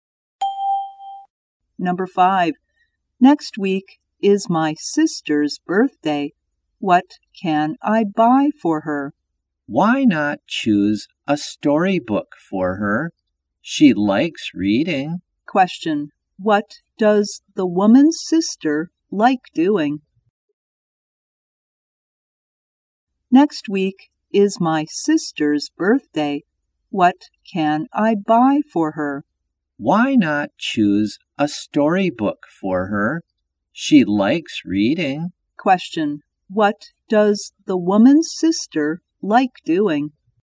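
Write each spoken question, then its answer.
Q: Question. What does the woman's sister like doing?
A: Reading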